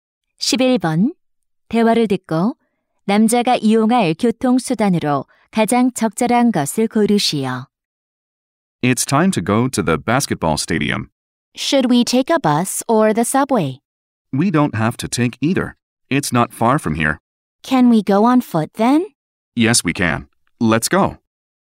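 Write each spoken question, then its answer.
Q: 대화를 듣고 남자가 이용할 교통수단으로 가장 적절한 것을 고르시오.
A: 도보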